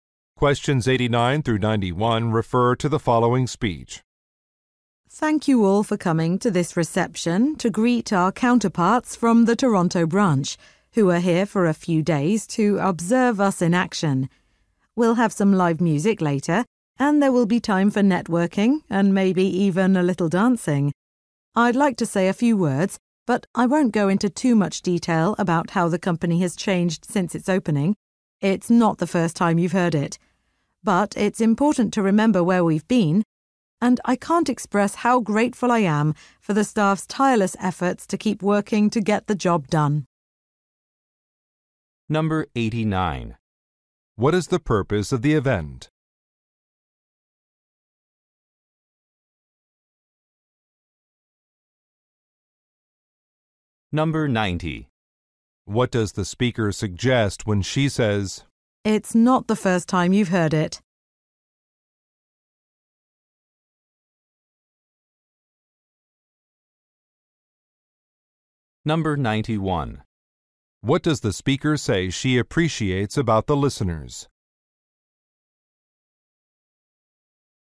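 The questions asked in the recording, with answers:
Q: What is the purpose of the event?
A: To welcome visitors from the Toronto branch

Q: What does the speaker suggest when she says, "It's not the first time you've heard it"?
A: The listeners already know the company's history

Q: What does the speaker say she appreciates about the listeners?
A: Their hard work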